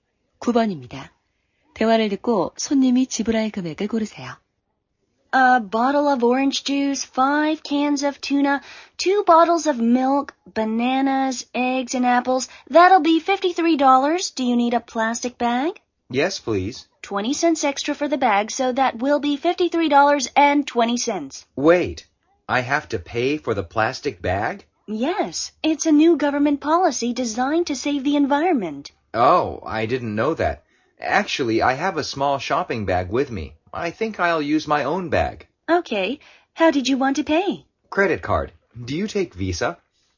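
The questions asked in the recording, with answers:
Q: 대화를 듣고 손님이 지불할 금액을 고르세요.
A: 53달러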